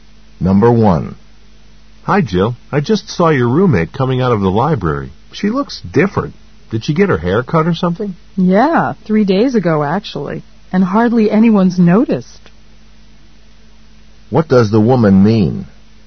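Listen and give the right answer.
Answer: Her roommate got a haircut three days ago, but hardly anyone has noticed.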